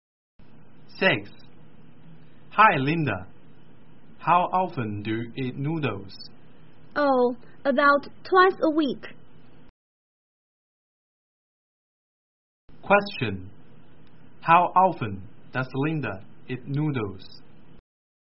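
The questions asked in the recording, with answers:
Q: How often does Linda eat noodles?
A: About twice a week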